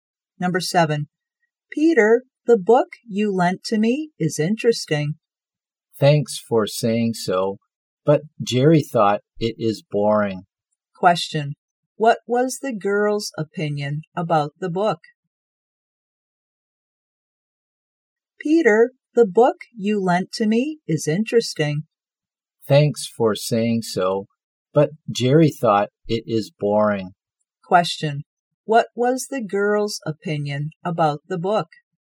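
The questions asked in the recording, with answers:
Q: what was the girl's opinion about the book?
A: Interesting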